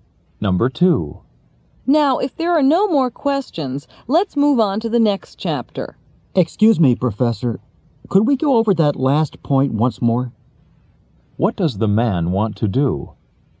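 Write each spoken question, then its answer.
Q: What does the man want to do?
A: Go over the last point again.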